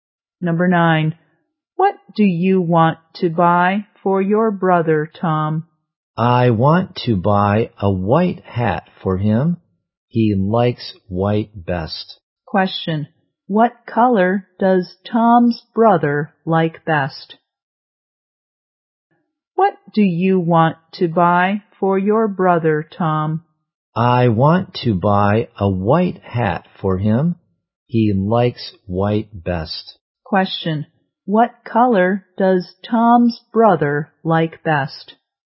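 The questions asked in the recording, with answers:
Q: what color does Tom's brother like best?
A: White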